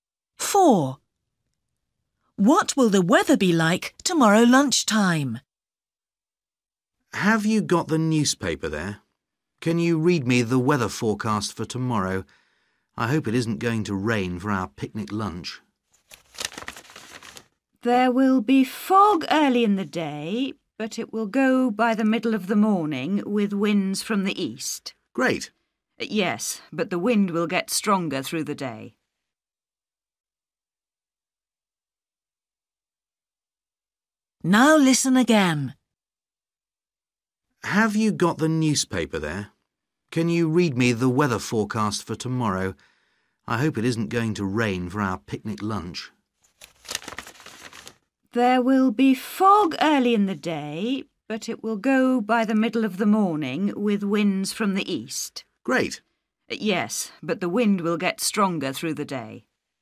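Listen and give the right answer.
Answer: windy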